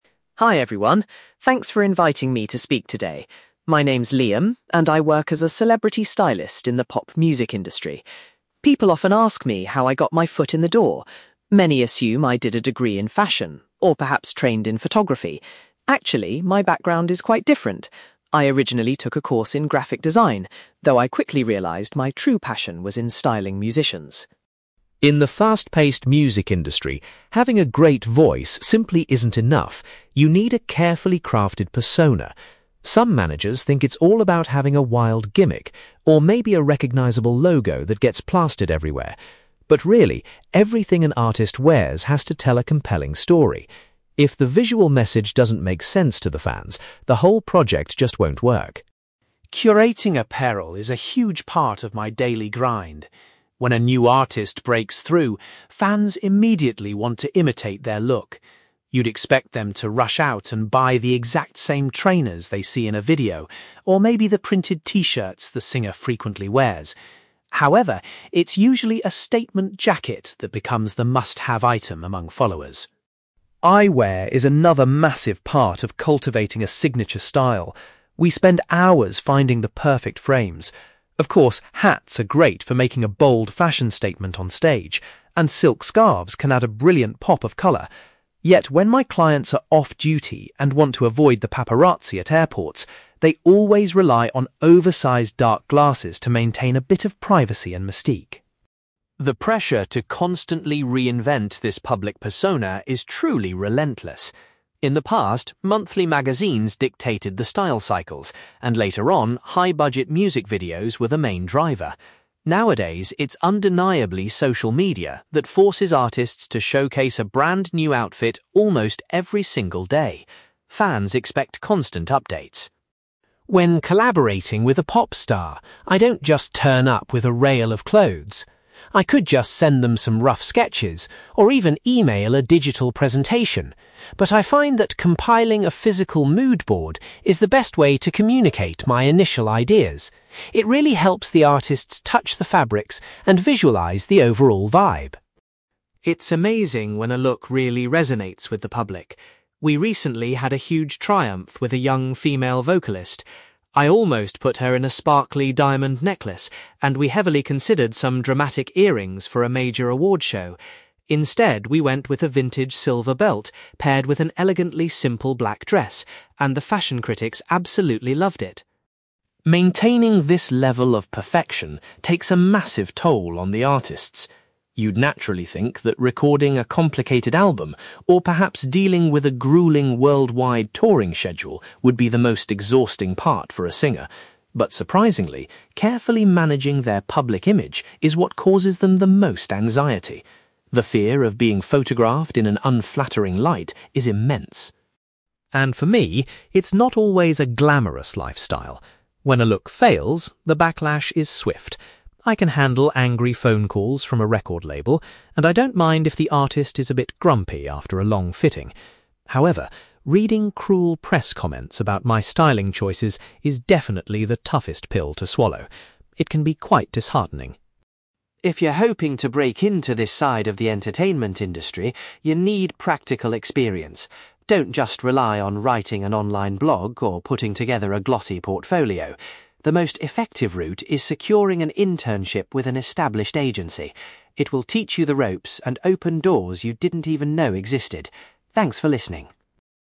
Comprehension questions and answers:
You will hear a stylist called Liam giving a presentation about working in the music industry. For questions 9-18, complete the sentences with a word or short phrase.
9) Liam studied (9)........................... before he started working in the fashion industry.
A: graphic design

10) Liam explains that a pop star's clothing choices must communicate a clear (10)........................... to the audience.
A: story

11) Liam has noticed that fans usually try to copy a singer's look by buying a similar (11)........................... .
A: jacket

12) To stay hidden from photographers, pop artists frequently choose to wear (12)........................... .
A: dark glasses

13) Liam points out that the need for celebrities to constantly change their outfits is driven by (13)........................... .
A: social media

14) Liam prefers using a mood board to show his (14)........................... to the singers he works with.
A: initial ideas

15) Liam's styling was highly praised when his client wore an antique (15)........................... at a major event.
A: silver belt

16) According to Liam, maintaining a (16)........................... creates the most stress for a pop star.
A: public image

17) Liam admits that the hardest part of his profession is facing negative (17)........................... .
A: press comments

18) Liam recommends that people wanting to enter the industry should try to get an (18)........................... to gain experience.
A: internship

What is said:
Liam: Hi everyone! Thanks for inviting me to speak today. My name is Liam, and I work as a celebrity stylist in the pop music industry. People often ask me how I got my foot in the door. Many assume I did a degree in fashion, or perhaps trained in photography. Actually, my background is quite different. I originally took a course in graphic design, though I quickly realised my true passion was in styling musicians.
In the fast-paced music industry, having a great voice simply isn't enough; you need a carefully crafted persona. Some managers think it's all about having a wild gimmick, or maybe a recognizable logo that gets plastered everywhere. But really, everything an artist wears has to tell a compelling story. If the visual message doesn't make sense to the fans, the whole project just won't work.
Curating apparel is a huge part of my daily grind. When a new artist breaks through, fans immediately want to imitate their look. You'd expect them to rush out and buy the exact same trainers they see in a video, or maybe the printed T-shirts the singer frequently wears. However, it's usually a statement jacket that becomes the must-have item among followers.
Eyewear is another massive part of cultivating a signature style. We spend hours finding the perfect frames. Of course, hats are great for making a bold fashion statement on stage, and silk scarves can add a brilliant pop of colour. Yet, when my clients are off-duty and want to avoid the paparazzi at airports, they always rely on oversized dark glasses to maintain a bit of privacy and mystique.
The pressure to constantly reinvent this public persona is truly relentless. In the past, monthly magazines dictated the style cycles, and later on, high-budget music videos were the main driver. Nowadays, it's undeniably social media that forces artists to showcase a brand new outfit almost every single day. Fans expect constant updates.
When collaborating with a pop star, I don't just turn up with a rail of clothes. I could just send them some rough sketches, or even email a digital presentation, but I find that compiling a physical mood board is the best way to communicate my initial ideas. It really helps the artists touch the fabrics and visualise the overall vibe.
It's amazing when a look really resonates with the public. We recently had a huge triumph with a young female vocalist. I almost put her in a sparkly diamond necklace, and we heavily considered some dramatic earrings for a major awards show. Instead, we went with a vintage silver belt paired with an elegantly simple black dress, and the fashion critics absolutely loved it!
Maintaining this level of perfection takes a massive toll on the artists. You'd naturally think that recording a complicated album, or perhaps dealing with a gruelling worldwide touring schedule would be the most exhausting part for a singer. But surprisingly, carefully managing their public image is what causes them the most anxiety. The fear of being photographed in an unflattering light is immense.
And for me, it's not always a glamorous lifestyle. When a look fails, the backlash is swift. I can handle angry phone calls from a record label, and I don't mind if the artist is a bit grumpy after a long fitting. However, reading cruel press comments about my styling choices is definitely the toughest pill to swallow. It can be quite disheartening.
If you're hoping to break into this side of the entertainment industry, you need practical experience. Don't just rely on writing an online blog or putting together a glossy portfolio. The most effective route is securing an internship with an established agency. It will teach you the ropes and open doors you didn't even know existed. Thanks for listening!

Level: B2